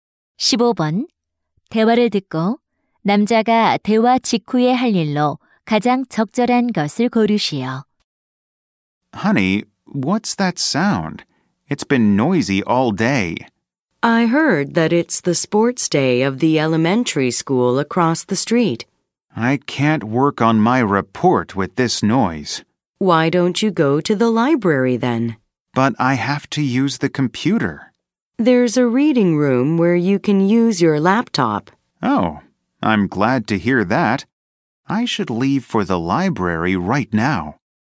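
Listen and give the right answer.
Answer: 도서관에 가기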